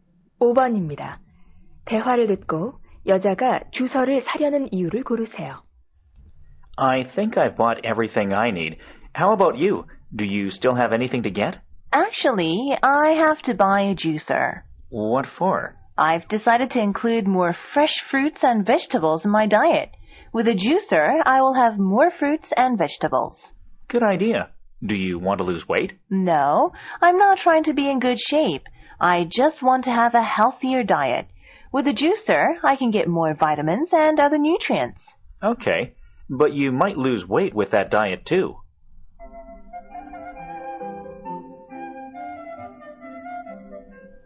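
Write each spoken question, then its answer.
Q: 대화를 듣고 여자가 주서를 사려는 이유를 고르세요.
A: 더 건강한 식단을 위해서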